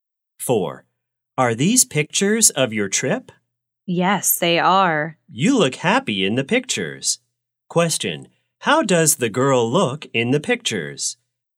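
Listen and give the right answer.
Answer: Happy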